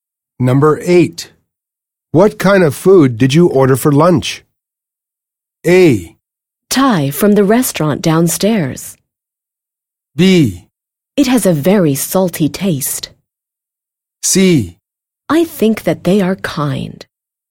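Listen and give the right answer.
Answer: A: Thai from the restaurant downstairs.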